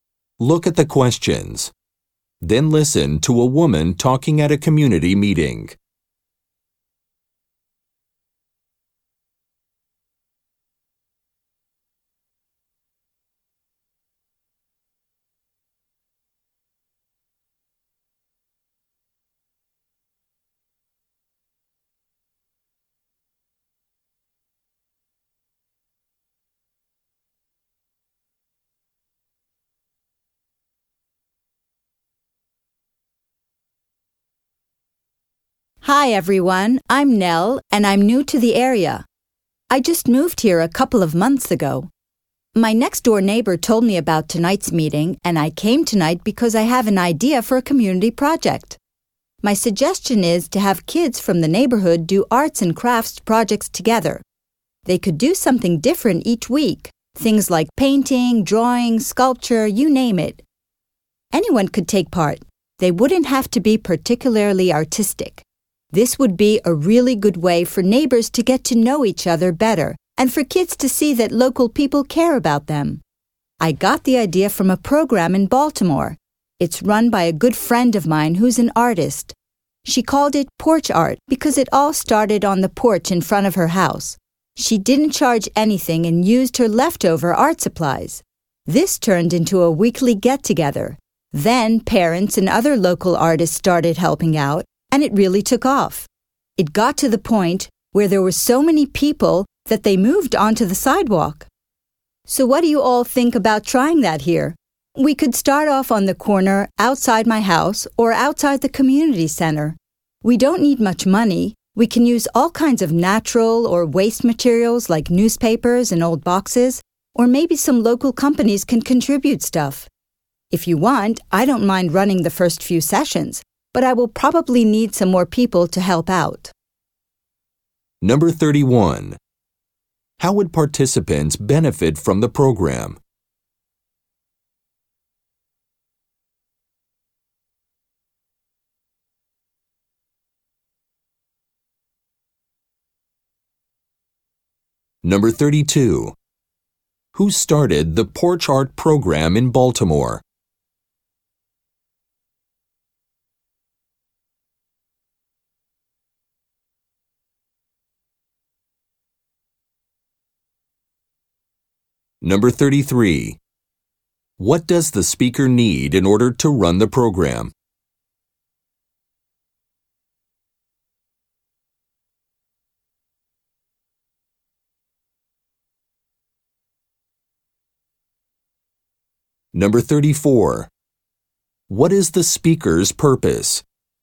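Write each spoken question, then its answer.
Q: How would participants benefit from the program?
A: Neighbors would get to know each other better, and kids would see that local people care about them

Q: Who started the Porch Art Program in Baltimore?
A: A friend of the speaker's who is an artist

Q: What does the speaker need in order to run the program?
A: More people to help

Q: What is the speaker's purpose?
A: To suggest a community arts project for kids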